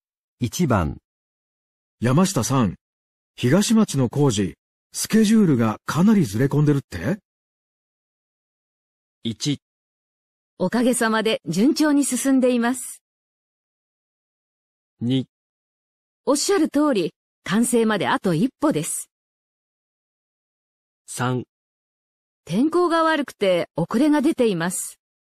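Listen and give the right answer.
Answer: 3: 天候が悪くて遅れが出ています。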